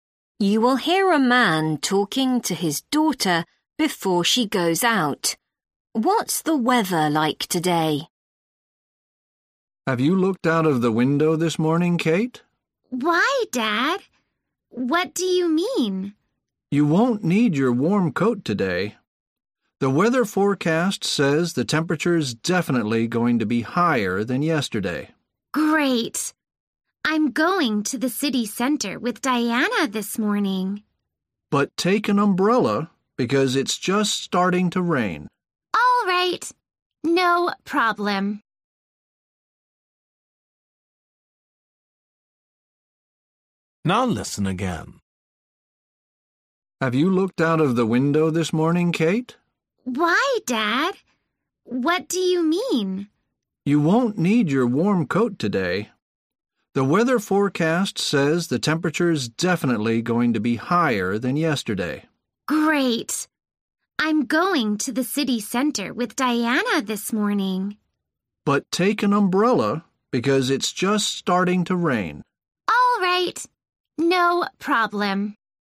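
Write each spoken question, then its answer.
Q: What's the weather like today?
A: Warmer than yesterday, and starting to rain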